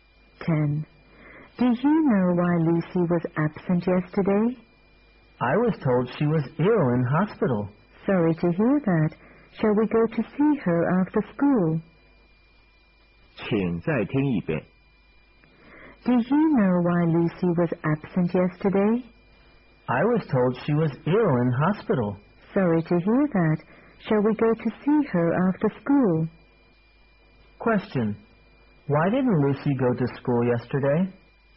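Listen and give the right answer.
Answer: She was ill in hospital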